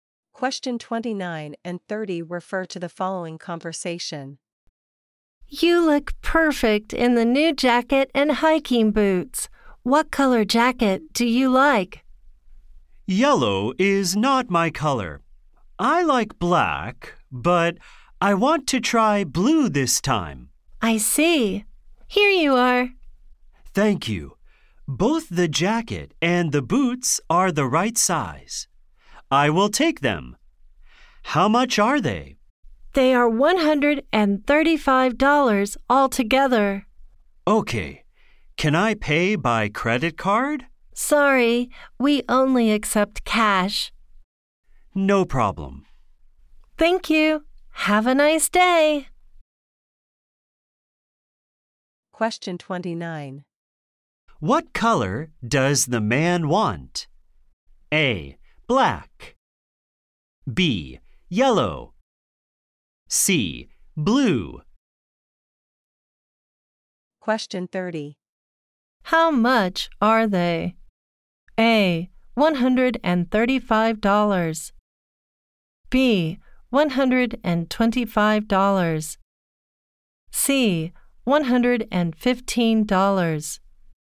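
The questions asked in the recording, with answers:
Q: What color does the man want?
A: C: Blue.

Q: How much are they?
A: A: $135.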